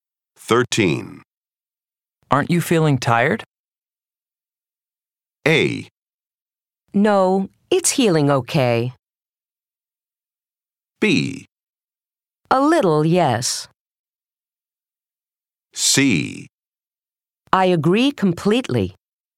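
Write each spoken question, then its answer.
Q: Aren't you feeling tired?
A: B: A little, yes.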